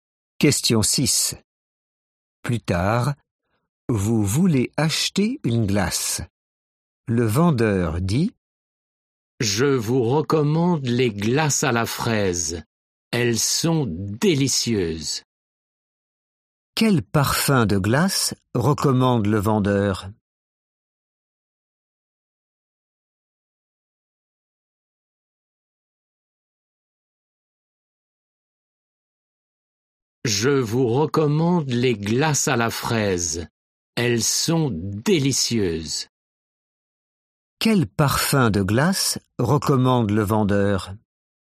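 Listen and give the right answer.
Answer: La fraise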